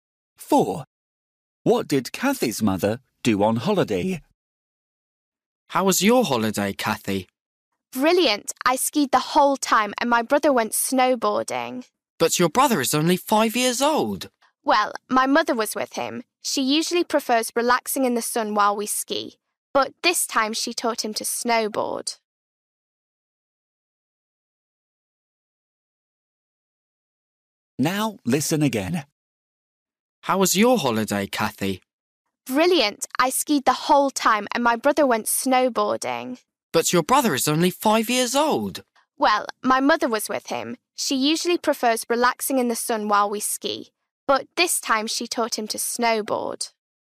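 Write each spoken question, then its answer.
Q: What did Kathy's mother do on holiday?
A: She taught Kathy's brother to snowboard (went snowboarding)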